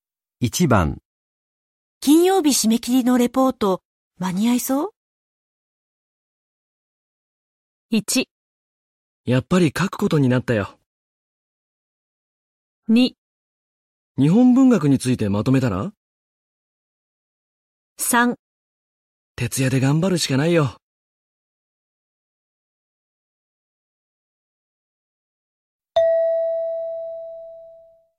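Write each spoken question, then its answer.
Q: 金曜日締め切りのレポート、間に合いそう?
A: 3: 徹夜で頑張るしかないよ。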